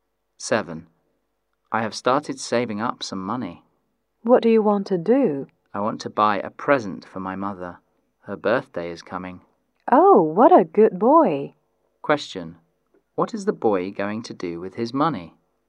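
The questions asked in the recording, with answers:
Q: What is the boy going to do with his money?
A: Buy a birthday present for his mother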